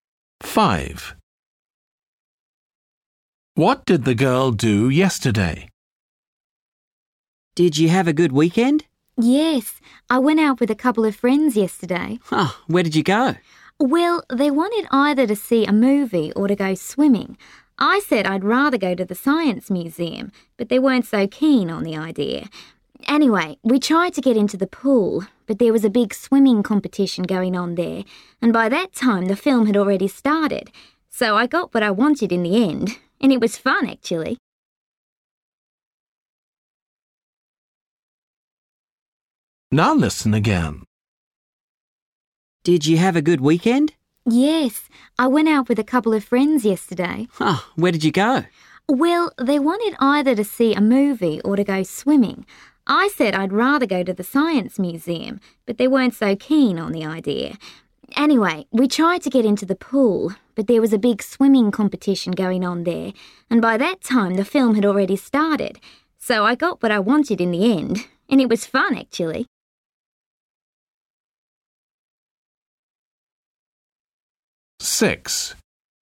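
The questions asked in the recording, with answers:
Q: What did the girl do yesterday?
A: went to the science museum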